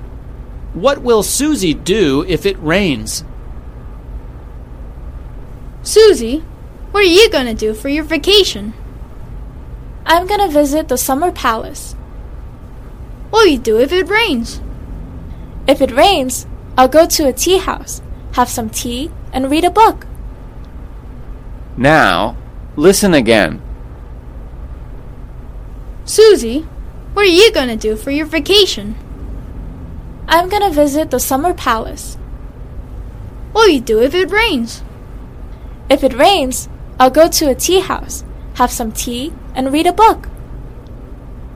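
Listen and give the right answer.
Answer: Go to a tea house, have some tea, and read a book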